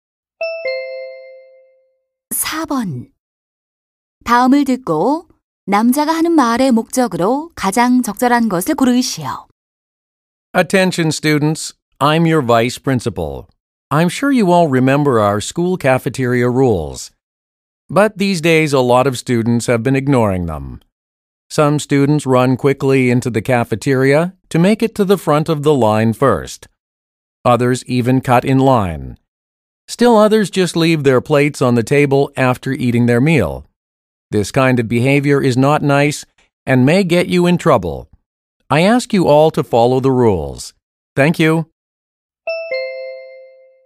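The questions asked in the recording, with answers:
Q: 다음을 듣고 남자가 하는 말의 목적으로 가장 적절한 것을 고르시오.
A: 학생들에게 학교 식당 규칙을 지킬 것을 당부하려고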